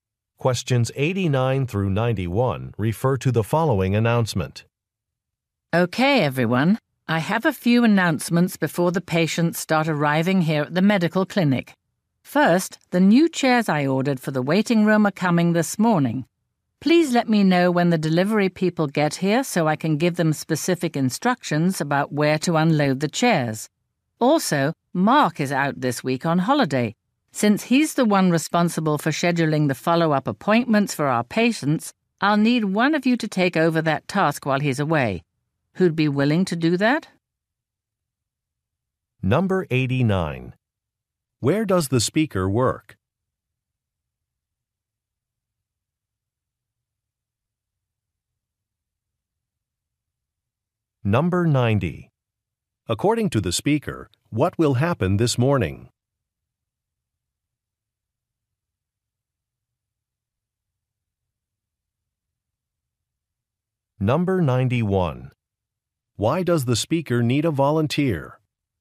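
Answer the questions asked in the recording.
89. At a medical clinic
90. New chairs will be delivered
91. To schedule follow-up appointments while Mark is away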